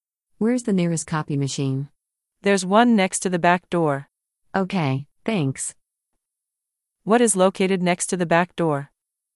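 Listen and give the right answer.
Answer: A copy machine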